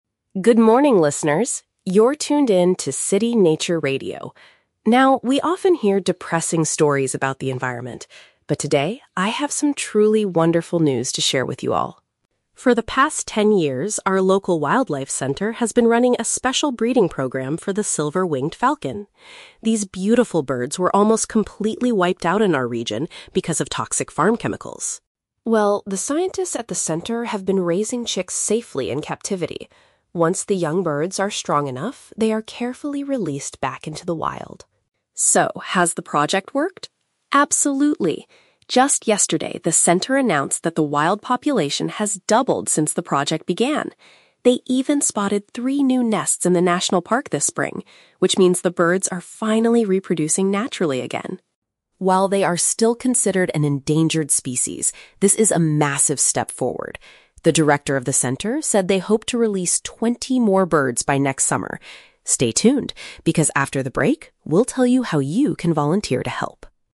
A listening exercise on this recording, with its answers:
Listen to a radio news bulletin and choose the best answer (A, B, or C) for each question.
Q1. According to the announcer, what originally caused the falcons to disappear from the area?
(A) Hunters catching the young birds to sell as pets.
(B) Dangerous substances used in local agriculture.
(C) A severe lack of safe nesting areas in the national park.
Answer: Dangerous substances used in local agriculture.

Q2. What is the major success of the wildlife center's breeding program?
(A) The number of falcons living in nature has increased by 100%.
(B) They have successfully rescued twenty injured birds this summer.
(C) They have discovered a brand-new species of wild falcon.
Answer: The number of falcons living in nature has increased by 100%.

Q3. What does the report indicate about the current status of the silver-winged falcon?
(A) They are completely safe and no longer need human protection.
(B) They are still officially classified as being at risk of extinction.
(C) They have become the most common bird in the local forest.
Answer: They are still officially classified as being at risk of extinction.

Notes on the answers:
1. The announcer states that the birds were wiped out because of "toxic farm chemicals." Option B uses synonyms: "dangerous substances" (toxic chemicals) and "agriculture" (farm).
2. The announcer shares that the "wild population has doubled." Option A paraphrases this mathematically as "increased by 100%."
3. The announcer reminds listeners that "they are still considered an endangered species." Option B paraphrases this as "officially classified as being at risk of extinction."

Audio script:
Announcer: Good morning, listeners! You're tuned in to City Nature Radio. Now, we often hear depressing stories about the environment, but today, I have some truly wonderful news to share with you all.
For the past ten years, our local wildlife center has been running a special breeding program for the silver-winged falcon. These beautiful birds were almost completely wiped out in our region because of toxic farm chemicals.
Well, the scientists at the center have been raising chicks safely in captivity. Once the young birds are strong enough, they are carefully released back into the wild.
So, has the project worked? Absolutely. Just yesterday, the center announced that the wild population has doubled since the project began. They even spotted three new nests in the national park this spring, which means the birds are finally reproducing naturally again.
While they are still considered an endangered species, this is a massive step forward. The director of the center said they hope to release twenty more birds by next summer. Stay tuned, because after the break, we'll tell you how you can volunteer to help.

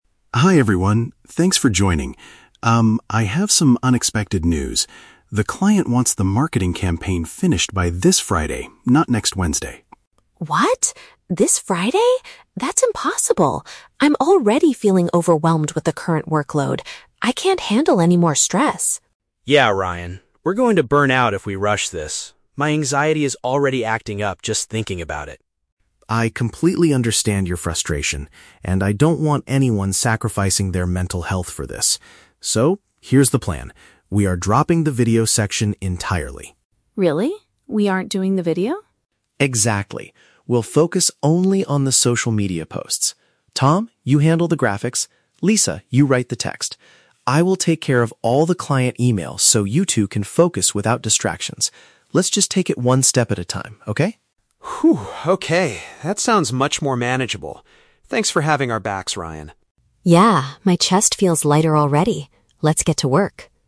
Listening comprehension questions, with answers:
Listen to a meeting between a team leader and his members. Choose the correct answer (A, B, or C) for each question.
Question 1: How do Lisa and Tom feel when they first hear the news?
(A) They are excited about the new challenge.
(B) They are highly stressed and fear extreme exhaustion.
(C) They are angry because they must work on the weekend.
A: They are highly stressed and fear extreme exhaustion.

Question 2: What is Ryan's main solution to help the team avoid burnout?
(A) Asking the client to give them a longer deadline.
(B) Hiring more designers to help finish the work faster.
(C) Canceling a specific part of the original project.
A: Canceling a specific part of the original project.

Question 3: What task will Ryan do to reduce his team's pressure?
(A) He will communicate with the client.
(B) He will design the graphics for social media.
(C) He will write the text for the campaign.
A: He will communicate with the client.

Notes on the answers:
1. The Key: Lisa says she is "overwhelmed" and can't handle "more stress." Tom mentions "anxiety" and says they are going to "burn out" (extreme exhaustion). The Trap (C): The deadline is "Friday," but nobody mentions working over the weekend. Students might guess this logically, but it's not in the audio. Plausible but not mentioned (A): They are definitely not excited; they are panicked.
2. The Key: Ryan says, "We are dropping the video section entirely." "Dropping" means canceling or not doing a specific part. The Trap (A): The "client" is mentioned as the one who shortened the deadline, but Ryan does not say he will ask them for more time. Plausible but not mentioned (B): Hiring more people is a good way to solve heavy workloads, but Ryan never suggests this.
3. The Key: Ryan says, "I will take care of all the client emails." Sending and receiving emails means communicating with the client. The Trap (B): Designing graphics is Tom's job ("Tom, you handle the graphics"). The Trap (C): Writing text is Lisa's job ("Lisa, you write the text").

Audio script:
Ryan: Hi everyone, thanks for joining. Um, I have some unexpected news. The client wants the marketing campaign finished by this Friday, not next Wednesday.
Lisa: What? This Friday? That's impossible! I'm already feeling overwhelmed with the current workload. I can't handle any more stress.
Tom: Yeah, Ryan. We're going to burn out if we rush this. My anxiety is already acting up just thinking about it.
Ryan: I completely understand your frustration, and I don't want anyone sacrificing their mental health for this. So, here's the plan. We are dropping the video section entirely.
Lisa: Really? We aren't doing the video?
Ryan: Exactly. We'll focus only on the social media posts. Tom, you handle the graphics. Lisa, you write the text. I will take care of all the client emails so you two can focus without distractions. Let's just take it one step at a time, okay?
okay. That sounds much more manageable. Thanks for having our backs, Ryan.

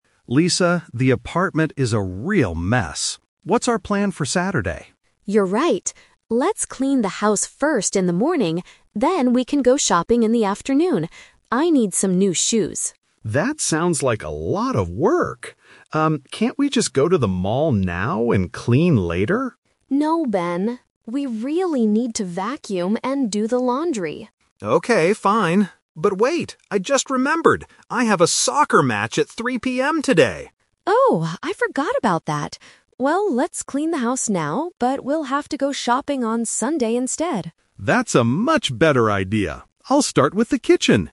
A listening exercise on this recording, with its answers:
Listen to the conversation and choose the correct answer (A, B, or C).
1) What are they going to do on Saturday morning?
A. Go to the mall to buy shoes.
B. Clean the apartment.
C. Watch a soccer match.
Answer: Clean the apartment.

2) Why can't they go shopping on Saturday afternoon?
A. Because they are too tired.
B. Because Lisa has to work.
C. Because Ben has a sports game.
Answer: Because Ben has a sports game.

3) When is the new time for their shopping trip?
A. Saturday morning.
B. Saturday afternoon.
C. Sunday.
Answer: Sunday.

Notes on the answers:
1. Lisa suggests "Let's clean the house first in the morning" and Ben eventually agrees. Option A is the plan for later, and Option C happens in the afternoon.
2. Ben says, "I have a soccer match at 3 PM today." A soccer match is a sports game. Option A and B are not mentioned in the dialogue.
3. This is "The Twist". Because of the match, Lisa says "we'll have to go shopping on Sunday instead." Option B was the original plan but they rejected it (The Trap).

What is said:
Ben: Lisa, the apartment is a real mess. What's our plan for Saturday?
Lisa: You're right. Let's clean the house first in the morning, then we can go shopping in the afternoon. I need some new shoes.
Ben: That sounds like a lot of work! Um, can't we just go to the mall now and clean later?
Lisa: No, Ben. We really need to vacuum and do the laundry.
Ben: Okay, fine. But wait... I just remembered! I have a soccer match at 3 PM today.
Lisa: Oh, I forgot about that! Well, let's clean the house now, but we'll have to go shopping on Sunday instead.

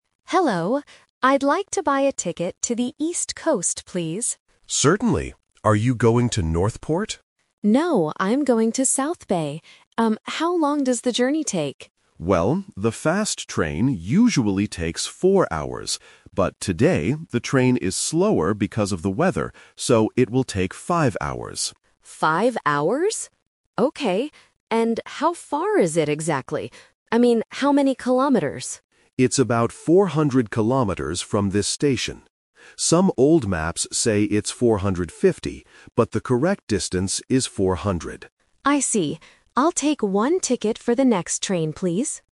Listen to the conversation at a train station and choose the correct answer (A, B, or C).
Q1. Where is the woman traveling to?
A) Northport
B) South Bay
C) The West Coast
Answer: South Bay

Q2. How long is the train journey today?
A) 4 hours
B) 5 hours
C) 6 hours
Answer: 5 hours

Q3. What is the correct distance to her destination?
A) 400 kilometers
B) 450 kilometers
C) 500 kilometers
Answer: 400 kilometers

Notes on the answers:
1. Why B is correct: The woman confirms: "No, I'm going to South Bay." Why A is a trap: "Northport" is the location that the ticket clerk guessed, but the woman denied it. Why C is wrong: "West Coast" is not mentioned. The audio is talking about the "East Coast".
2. Why B is correct: This uses "The Twist" technique. The staff member says it usually takes 4 hours, but "today... it will take 5 hours" due to the weather. The question specifically asks about the travel time today. Why A is a trap: 4 hours is the usual time, not the time for today. Why C is wrong: 6 hours is not mentioned in the audio at all.
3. Why A is correct: The staff member confirms that "the correct distance is 400." Why B is a trap: "450" is the number shown on some old maps. This can easily confuse students if they only catch keywords instead of listening to the whole sentence. Why C is wrong: 500 is not mentioned in the audio.

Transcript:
Passenger (Woman): Hello. I'd like to buy a ticket to the East Coast, please.
Agent (Man): Certainly. Are you going to Northport?
Passenger: No, I'm going to South Bay. Um, how long does the journey take?
Agent: Well, the fast train usually takes 4 hours. But today, the train is slower because of the weather, so it will take 5 hours.
Okay. And how far is it exactly? I mean, how many kilometers?
Agent: It's about 400 kilometers from this station. Some old maps say it's 450, but the correct distance is 400.

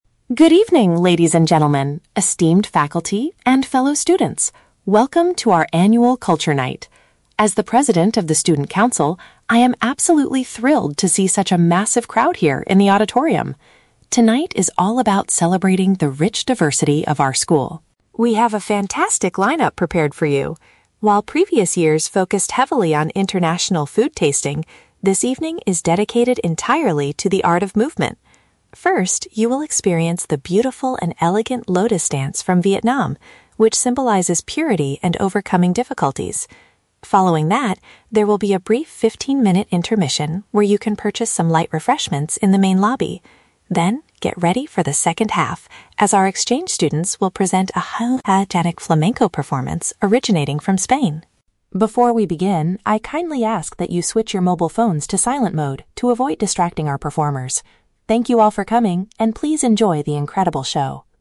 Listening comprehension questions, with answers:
Listen to a welcome speech at a school event and choose the correct answer (A, B, or C) for each question.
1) What is the main focus of this year's Culture Night?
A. Tasting different types of international dishes.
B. Watching various styles of traditional physical performance.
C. Listening to a presentation about cultural diversity.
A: Watching various styles of traditional physical performance.

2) What is mentioned about the Vietnamese Lotus Dance?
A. It represents cleanliness and the ability to get through hard times.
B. It will be performed right after the fifteen-minute break.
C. It is a very fast and highly energetic routine.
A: It represents cleanliness and the ability to get through hard times.

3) What are the audience members requested to do before the show starts?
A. Turn off their electronic devices completely.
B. Buy their drinks and snacks in the main hall.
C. Ensure that their cell phones do not make any noise.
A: Ensure that their cell phones do not make any noise.

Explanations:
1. The speaker says this evening is "dedicated entirely to the art of movement" (which includes the Lotus Dance and Flamenco). Option (B) uses paraphrasing ("physical performance" = art of movement). Option (A) is a trap; "international food tasting" is mentioned, but the speaker explicitly says that was the focus in previous years, not this year. Option (C) is a plausible guess but is not mentioned.
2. The speaker explains that the Lotus Dance "symbolizes purity and overcoming difficulties." Option (A) accurately paraphrases this ("cleanliness" = purity, "get through hard times" = overcoming difficulties). Option (B) is a trap; the dance happens before the intermission (break), not after it. Option (C) is a trap; "highly energetic" is used to describe the Spanish Flamenco, not the Lotus Dance.
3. The speaker asks the audience to "switch your mobile phones to silent mode." Option (C) expresses the same idea using different words. Option (A) is a trap; they are asked to put phones on silent, not to turn them off completely. Option (B) is a trap; purchasing refreshments happens during the intermission, not before the show starts.

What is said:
Student Representative: Good evening, ladies and gentlemen, esteemed faculty, and fellow students. Welcome to our annual Culture Night! As the president of the student council, I am absolutely thrilled to see such a massive crowd here in the auditorium. Tonight is all about celebrating the rich diversity of our school.
We have a fantastic lineup prepared for you. While previous years focused heavily on international food tasting, this evening is dedicated entirely to the art of movement. First, you will experience the beautiful and elegant Lotus Dance from Vietnam, which symbolizes purity and overcoming difficulties. Following that, there will be a brief fifteen-minute intermission where you can purchase some light refreshments in the main lobby. Then, get ready for the second half, as our exchange students will present a highly energetic Flamenco performance originating from Spain.
Before we begin, I kindly ask that you switch your mobile phones to silent mode to avoid distracting our performers. Thank you all for coming, and please enjoy the incredible show!

